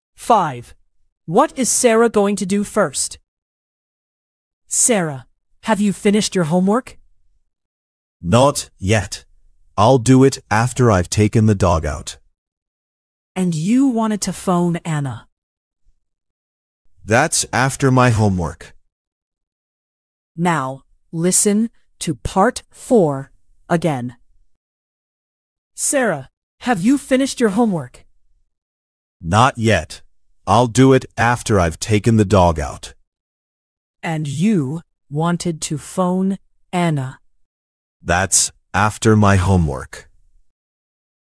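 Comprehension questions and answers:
What is Sarah going to do first?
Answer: take the dog out

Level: 劍橋兒童英檢 Flyers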